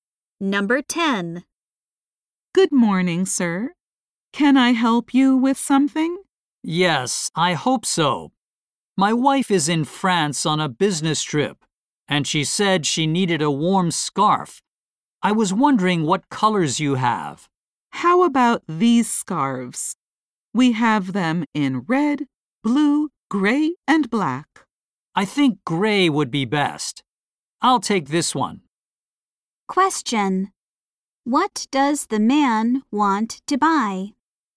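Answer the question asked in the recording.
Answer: A warm scarf for his wife.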